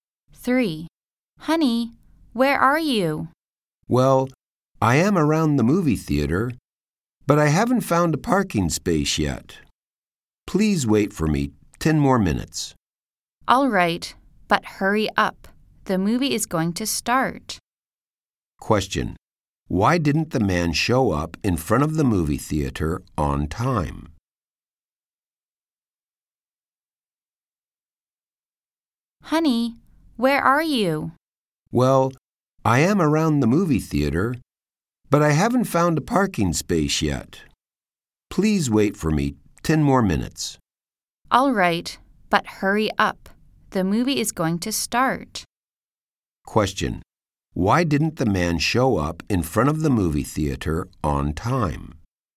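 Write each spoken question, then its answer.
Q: Why didn't the man show up in front of the movie theater on time?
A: He hadn't found a parking space yet.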